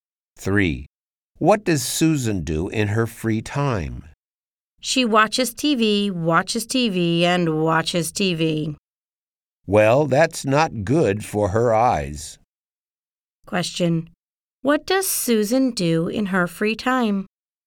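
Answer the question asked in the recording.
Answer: She watches TV.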